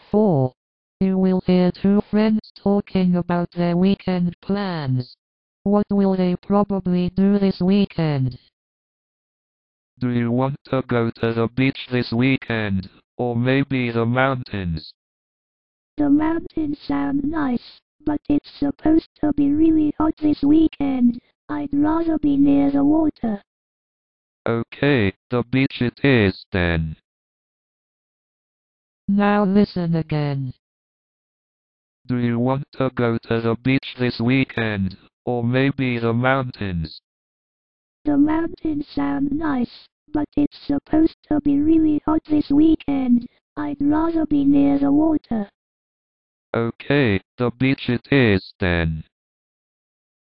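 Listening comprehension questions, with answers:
For each question, choose the correct answer.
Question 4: What will they probably do this weekend?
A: Go to the beach

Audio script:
You will hear two friends talking about their weekend plans.
ManDo you want to go to the beach this weekend, or maybe the mountains?
WomanThe mountains sound nice, but it's supposed to be really hot this weekend — I'd rather be near the water.
ManOK, the beach it is, then!

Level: KET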